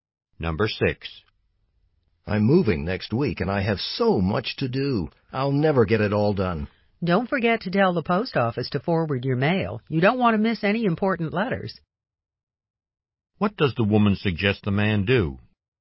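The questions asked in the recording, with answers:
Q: What does the woman suggest the man do?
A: Tell the post office to forward his mail.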